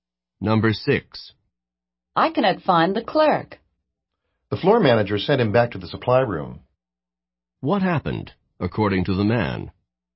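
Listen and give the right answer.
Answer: The floor manager sent the clerk to the supply room.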